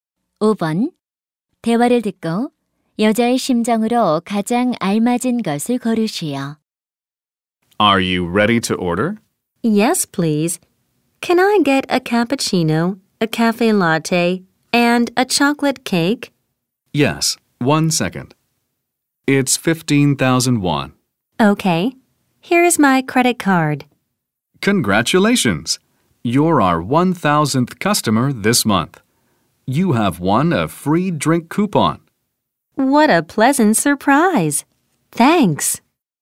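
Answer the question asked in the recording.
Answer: 기쁘고 놀람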